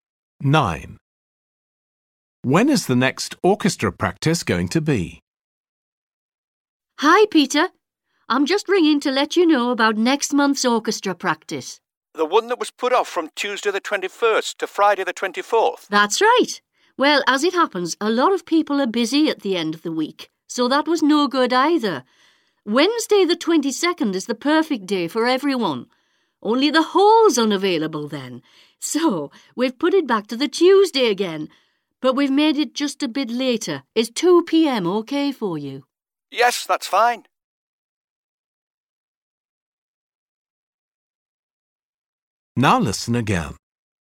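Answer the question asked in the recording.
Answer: Tuesday the 21st at 2 p.m.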